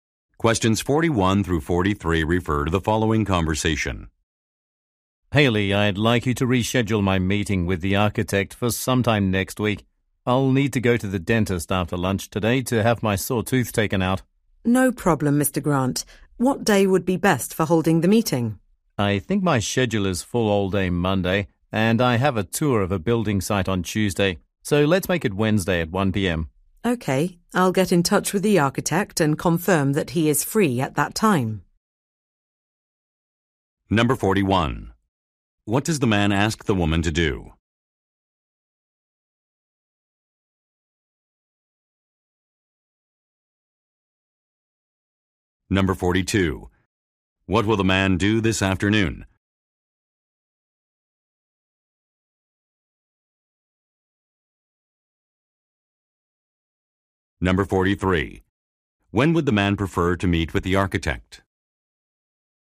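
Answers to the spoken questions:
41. Reschedule a meeting
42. Go to the dentist
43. Wednesday at 1 p.m.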